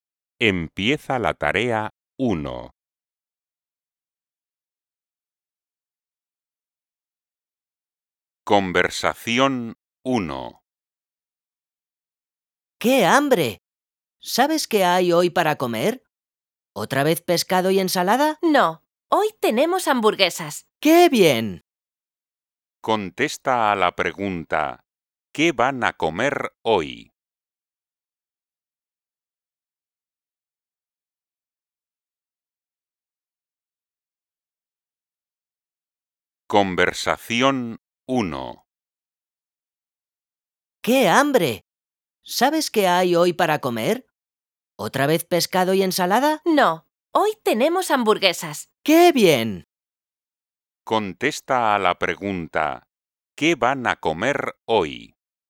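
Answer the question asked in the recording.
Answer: hamburguesas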